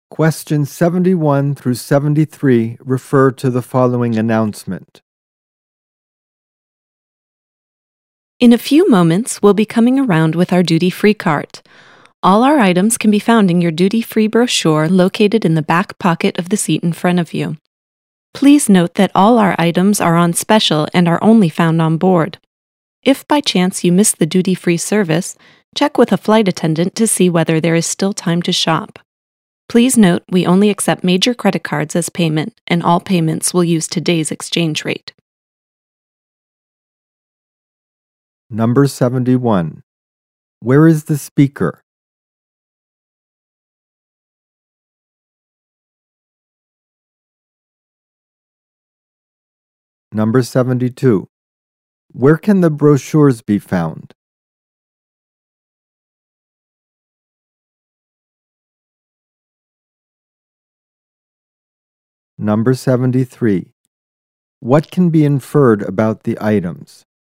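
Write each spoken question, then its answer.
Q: Where is the speaker?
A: On an airplane

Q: Where can the brochures be found?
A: In the back pocket of the seat in front

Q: What can be inferred about the items?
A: They are on special and only available on board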